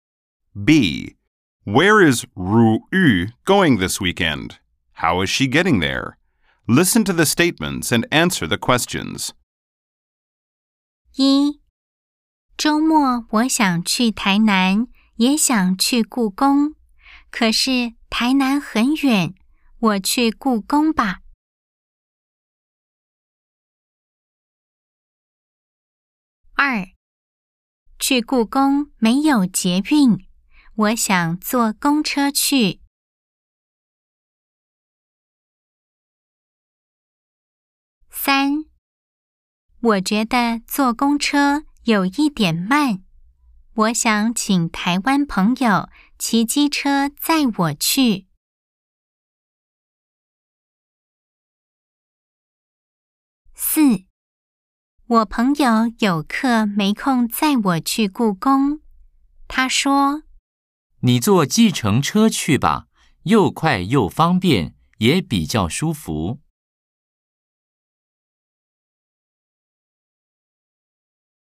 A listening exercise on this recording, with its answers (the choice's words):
B. Cuối tuần này 如玉 (Như Ngọc) đi đâu? Đi bằng gì? 🎧 08-4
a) 臺南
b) 故宮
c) 坐公車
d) 騎機車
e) 坐計程車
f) 朋友載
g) 坐公車有點慢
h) 比較快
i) 很舒服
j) 沒有空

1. 如玉週末想去哪裡?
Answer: 故宮

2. 如玉想怎麼去?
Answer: 坐公車

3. 如玉為什麼想請朋友載她去?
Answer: 坐公車有點慢

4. 如玉的朋友說如玉可以怎麼去?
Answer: 坐計程車

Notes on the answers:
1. 週末,我想去台南、也想去故宮,可是台南很遠,我去故宮吧。
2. 去故宮沒有捷運,我想坐公車去。
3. 我覺得坐公車有一點慢,我想請台灣朋友騎機車載我去。
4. 我朋友有課、沒空載我去故宮。他說:"你坐計程車去吧,又快又方便、也比較舒服。"